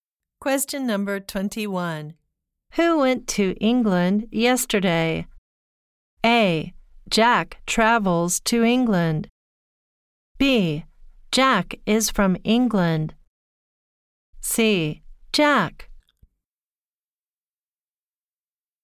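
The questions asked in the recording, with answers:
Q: Who went to England yesterday?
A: C: Jack.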